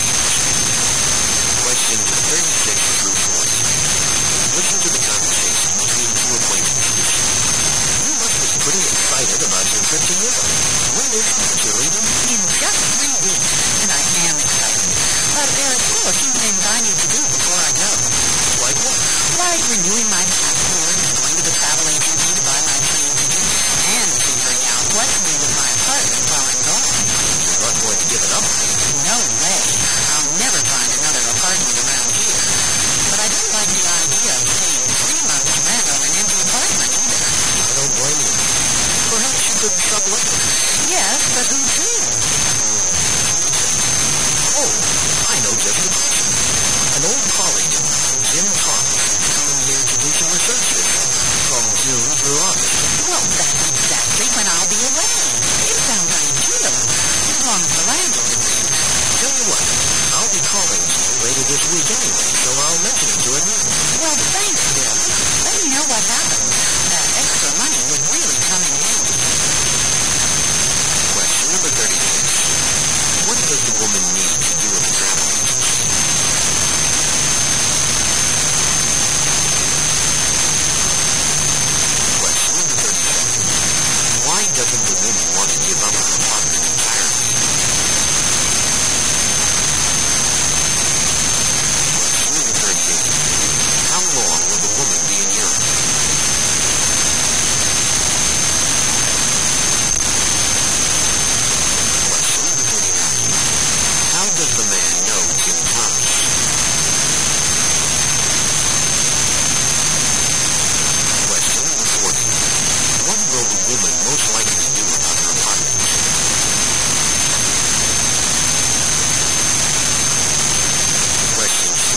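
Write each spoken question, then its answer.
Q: What does the woman need to do with the travel agency?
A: Buy her plane ticket

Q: Why doesn't the woman want to give up her apartment entirely?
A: She would never find another apartment around there

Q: How long will the woman be in Europe?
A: Three months

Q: How does the man know Jim Thomas?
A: Jim is an old colleague

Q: What will the woman most likely do about her apartment?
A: Sublet it to Jim Thomas for the summer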